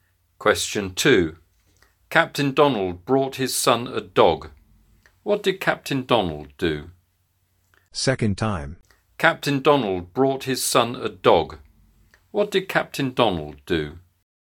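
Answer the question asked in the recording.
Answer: He brought his son a dog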